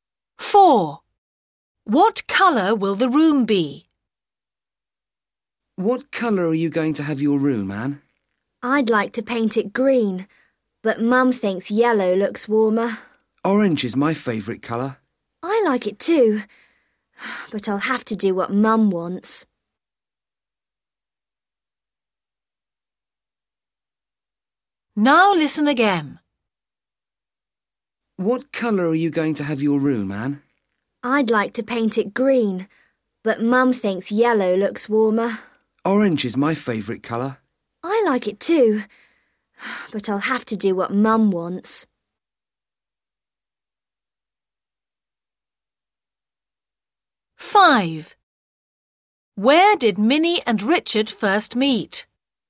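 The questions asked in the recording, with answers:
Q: What colour will the room be?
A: yellow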